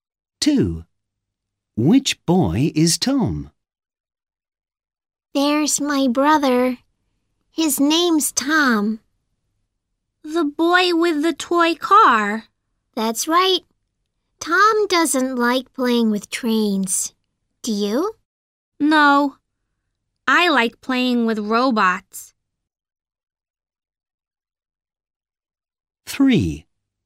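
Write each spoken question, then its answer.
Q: Which boy is Tom?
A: the boy with the toy car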